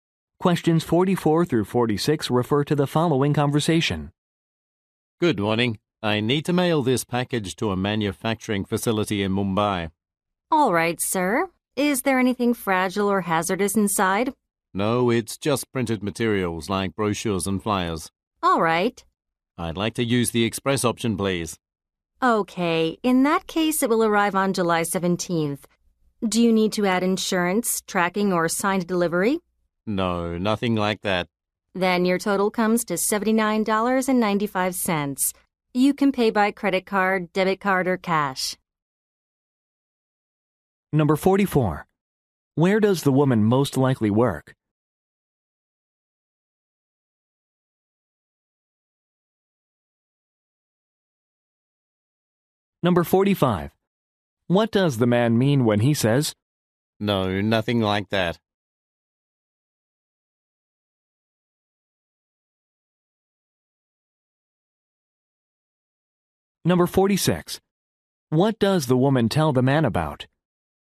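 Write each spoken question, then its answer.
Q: Where does the woman most likely work?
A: At a post office

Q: What does the man mean when he says?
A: He doesn't need any additional services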